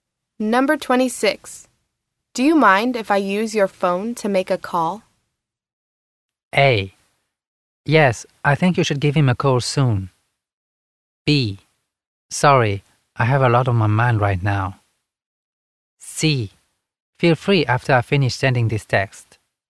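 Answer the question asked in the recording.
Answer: C: Feel free after I finish sending this text.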